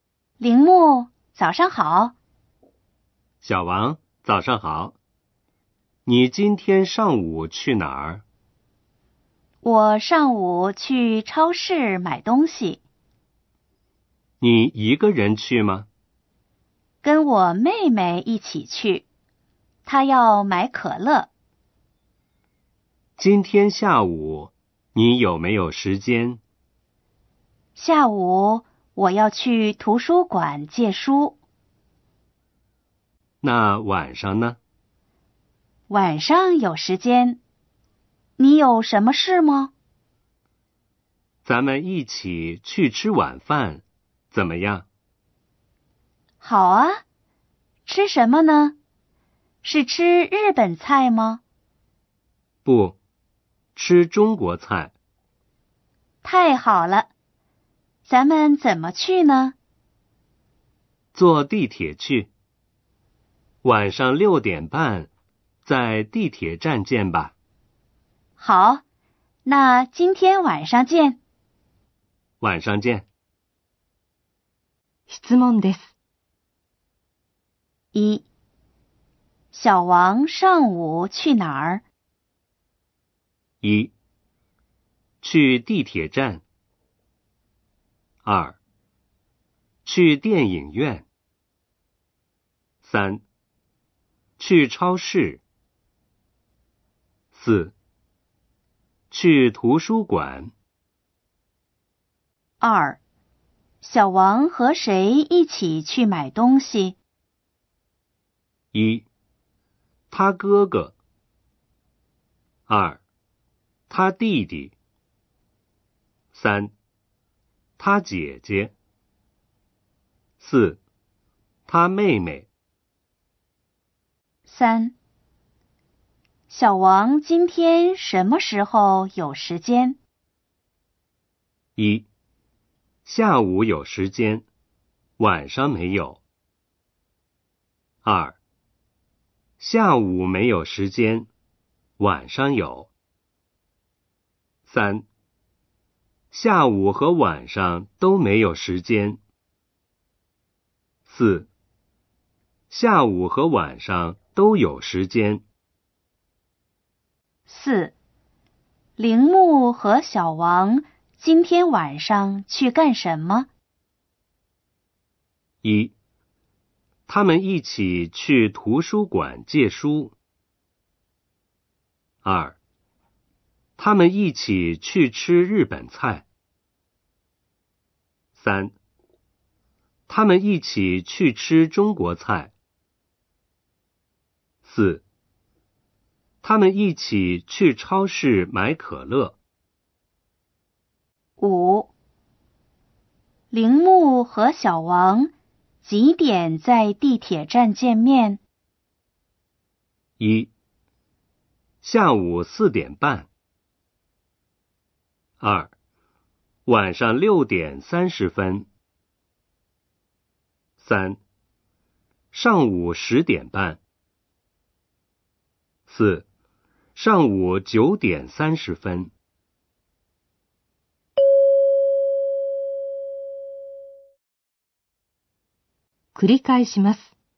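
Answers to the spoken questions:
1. 3: 去超市。
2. 4: 他妹妹。
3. 2: 下午没有时间,晚上有。
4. 3: 他们一起去吃中国菜。
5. 2: 晚上六点三十分。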